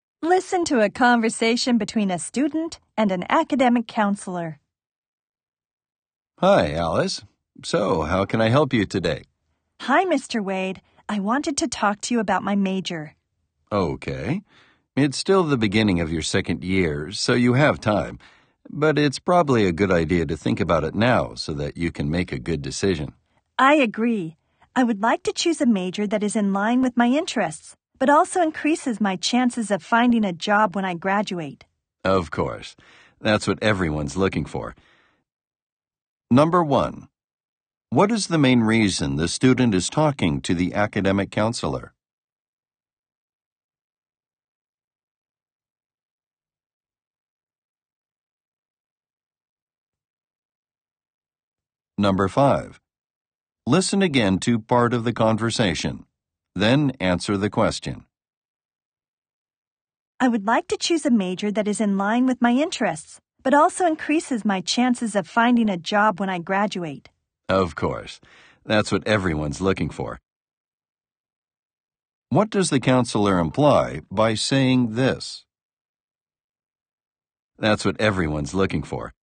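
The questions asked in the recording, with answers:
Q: what is the main reason the student is talking to the academic counselor?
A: To talk about choosing her major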